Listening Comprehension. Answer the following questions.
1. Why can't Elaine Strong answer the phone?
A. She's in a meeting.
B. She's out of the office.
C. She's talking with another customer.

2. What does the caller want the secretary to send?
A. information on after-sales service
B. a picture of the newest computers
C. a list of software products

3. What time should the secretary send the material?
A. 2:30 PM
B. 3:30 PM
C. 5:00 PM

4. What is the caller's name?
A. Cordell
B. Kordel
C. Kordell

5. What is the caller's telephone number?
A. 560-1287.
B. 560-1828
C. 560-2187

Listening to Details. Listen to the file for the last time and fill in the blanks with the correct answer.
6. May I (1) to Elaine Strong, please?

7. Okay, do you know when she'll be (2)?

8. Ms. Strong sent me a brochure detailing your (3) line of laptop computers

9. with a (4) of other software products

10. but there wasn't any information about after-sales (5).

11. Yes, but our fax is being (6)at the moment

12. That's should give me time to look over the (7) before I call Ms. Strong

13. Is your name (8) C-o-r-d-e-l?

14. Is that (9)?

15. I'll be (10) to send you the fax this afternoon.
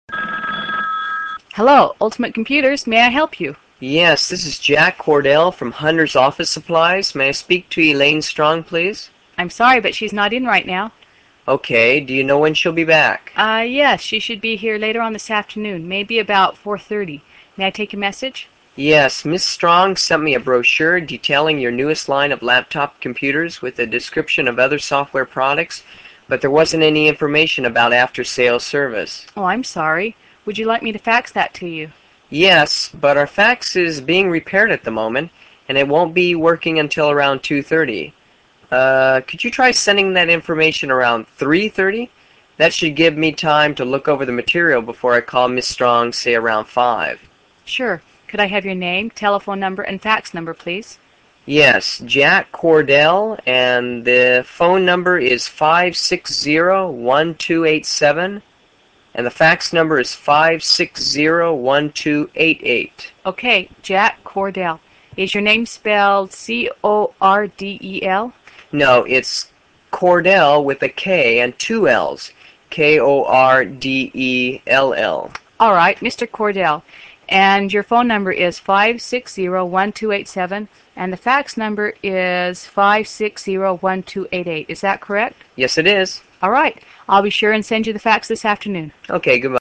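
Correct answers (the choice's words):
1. She's out of the office.
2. information on after-sales service
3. 3:30 PM
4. Kordell
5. 560-1287.
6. speak
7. back
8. newest
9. description
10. service
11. repaired
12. material
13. spelled
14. correct
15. sure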